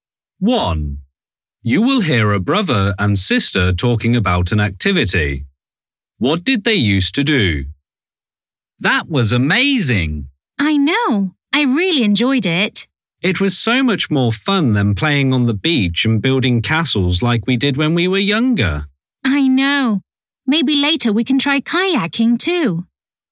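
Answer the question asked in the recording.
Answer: They played on the beach and built castles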